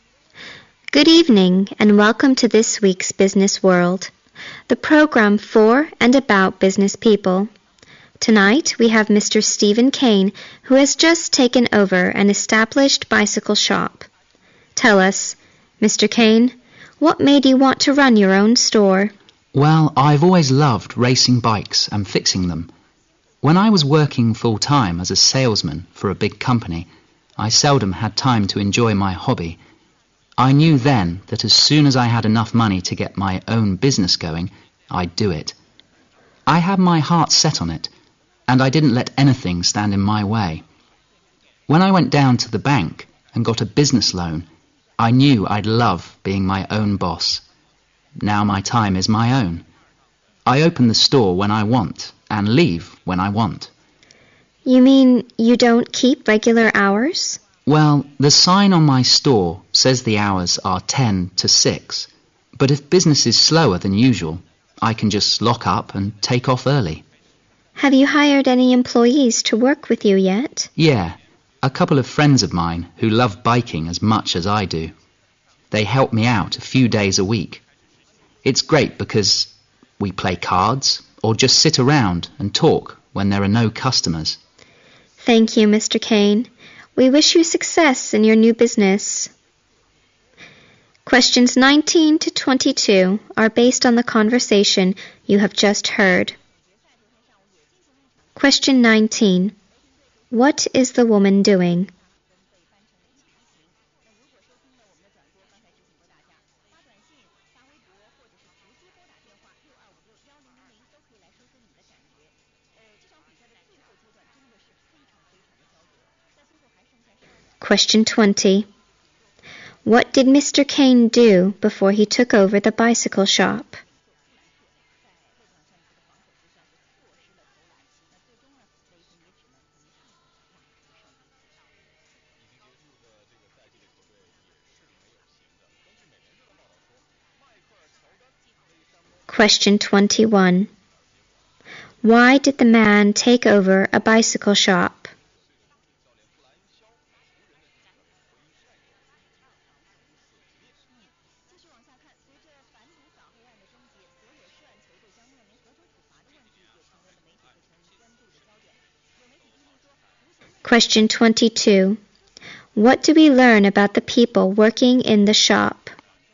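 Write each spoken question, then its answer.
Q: What is the woman doing?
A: Hosting a business program (interviewing Mr. Kane)

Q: What did Mr. Kane do before he took over the bicycle shop?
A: He was a salesman for a big company

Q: Why did the man take over a bicycle shop?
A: He loved bikes and wanted to be his own boss

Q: What do we learn about the people working in the shop?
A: They are his friends who love biking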